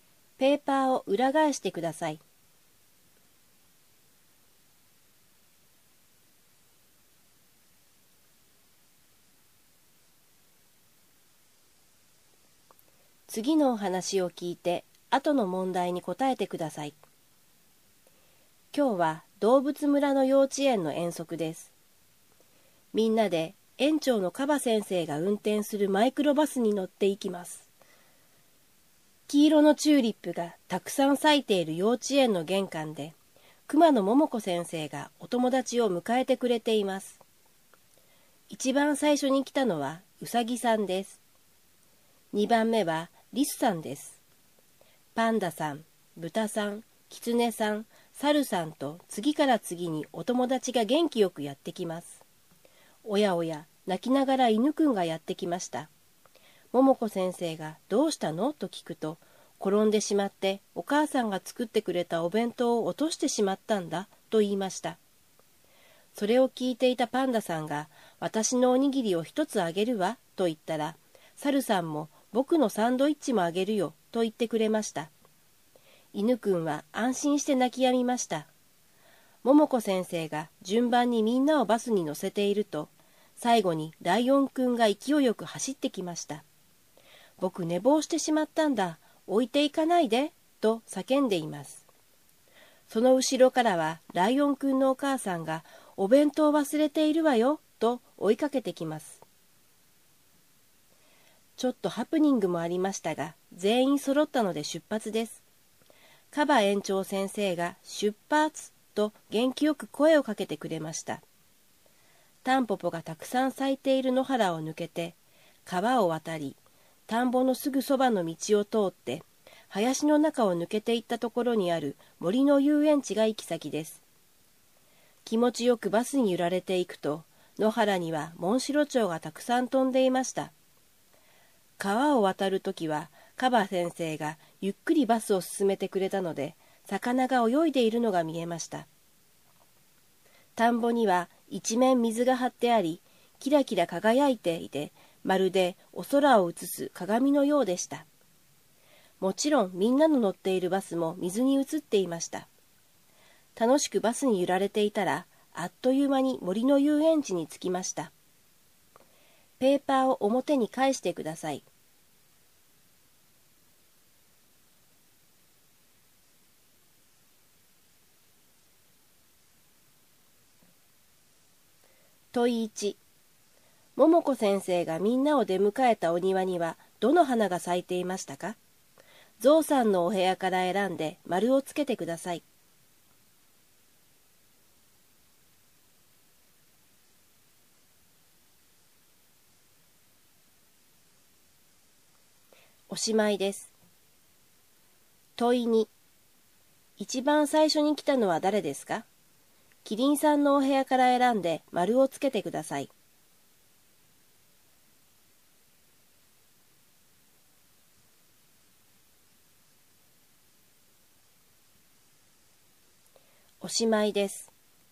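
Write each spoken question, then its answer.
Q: 桃子先生がみんなを出迎えたお庭にはどの花が咲いていましたか?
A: 黄色のチューリップ

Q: 一番最初に来たのは誰ですか?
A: ウサギさん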